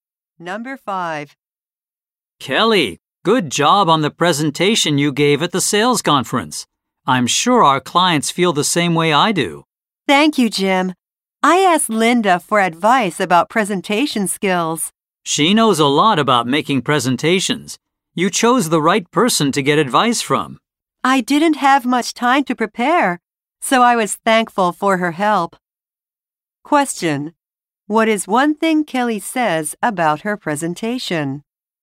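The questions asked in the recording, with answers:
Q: What is one thing Kelly says about her presentation?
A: She got advice from Linda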